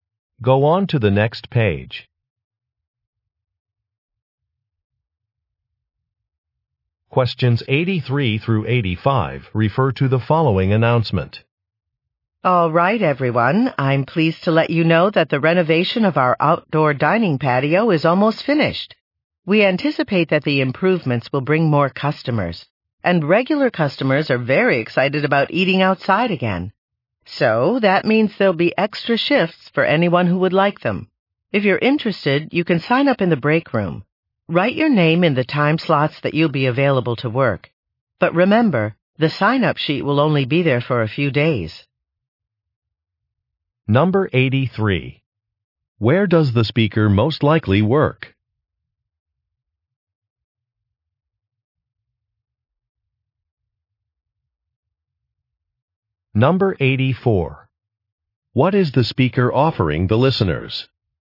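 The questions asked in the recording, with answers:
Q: Where does the speaker most likely work?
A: At a restaurant

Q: What is the speaker offering the listeners?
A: Extra work shifts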